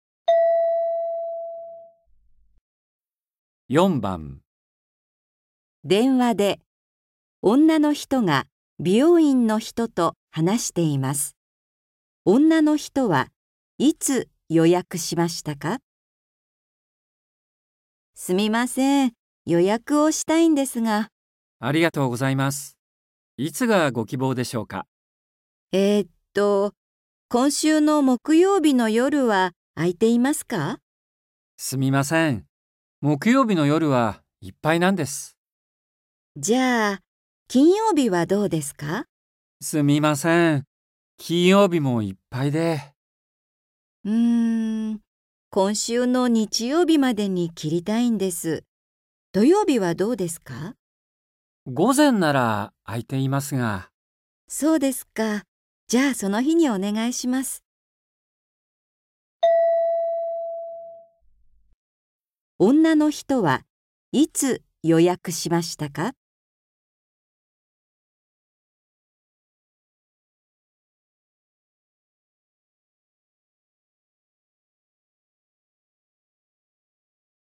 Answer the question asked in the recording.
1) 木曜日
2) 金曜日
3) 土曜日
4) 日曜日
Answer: 3) 土曜日

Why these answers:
F: すみません。予約をしたいんですが。 M: ありがとうございます。いつがご希望でしょうか。F: えーっと...今週の木曜日の夜は空いていますか。 M: すみません。木曜日の夜はいっぱいなんです。 F: じゃあ、金曜日はどうですか。 M: すみません。金曜日もいっぱいで... F: うん、今週の日曜日までに切りたいんです。土曜日はどうですか。 M: 午前なら空いていますが... F: そうですか...。じゃあ、その日にお願いします。

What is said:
M: すみません。木曜日の夜はいっぱいなんです。
F: じゃあ、金曜日はどうですか。
M: すみません。金曜日もいっぱいで...
F: うん、今週の日曜日までに切りたいんです。土曜日はどうですか。
M: 午前なら空いていますが...
F: そうですか...。じゃあ、その日にお願いします。
女の人はいつ予約しましたか。

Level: N4